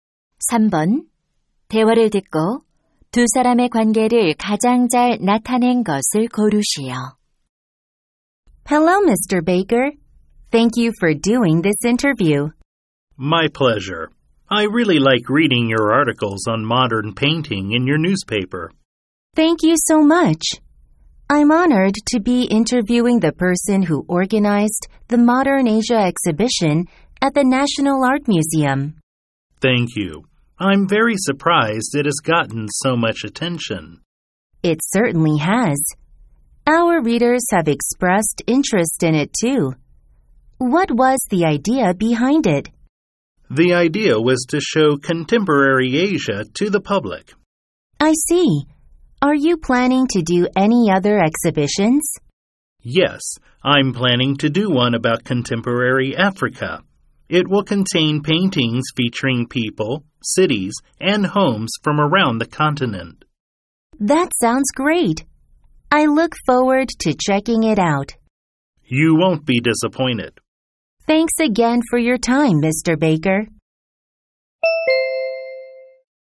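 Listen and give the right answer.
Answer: 신문 기자 - 전시 기획자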